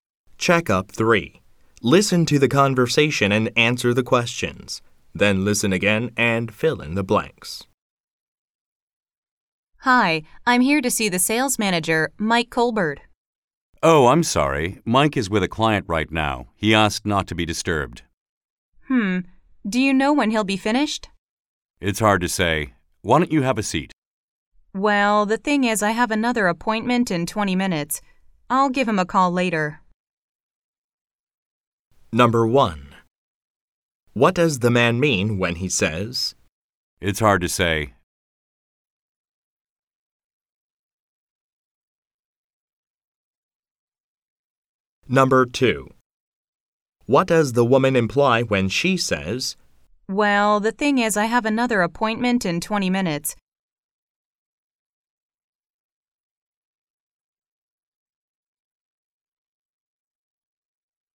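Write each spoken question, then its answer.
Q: What does the man mean when he says? It's hard to say.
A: He doesn't know when Mike will be finished.

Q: What does the woman imply when she says? Well, the thing is, I have another appointment in 20 minutes.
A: She can't wait for Mike to finish.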